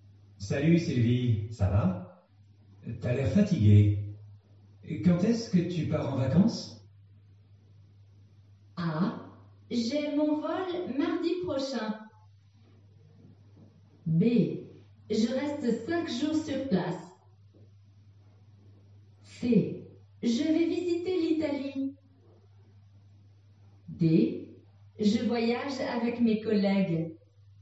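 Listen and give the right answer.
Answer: A: J'ai mon vol mardi prochain.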